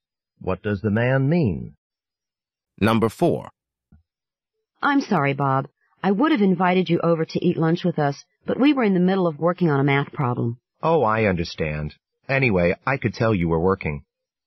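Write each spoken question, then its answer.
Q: What does the man mean?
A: He understands and isn't offended at not being invited.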